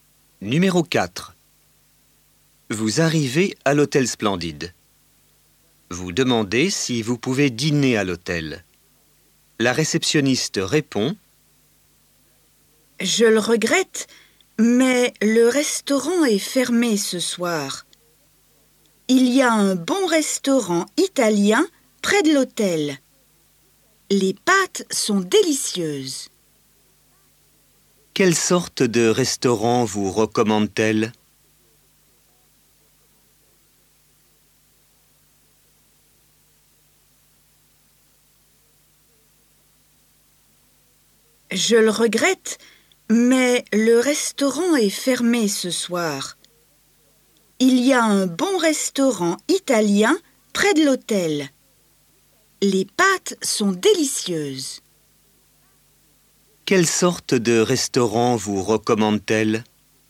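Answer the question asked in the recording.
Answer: Un restaurant italien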